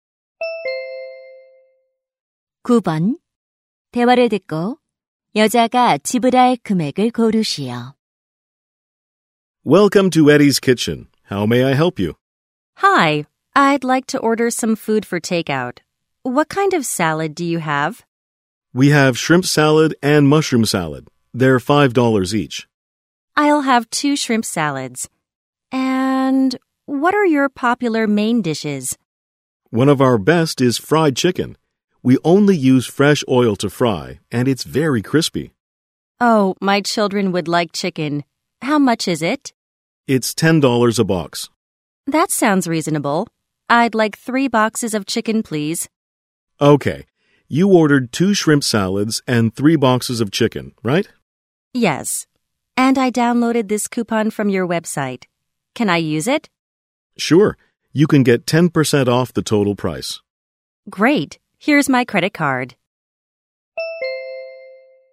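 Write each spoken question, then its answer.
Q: 대화를 듣고 여자가 지불할 금액을 고르시오.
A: $36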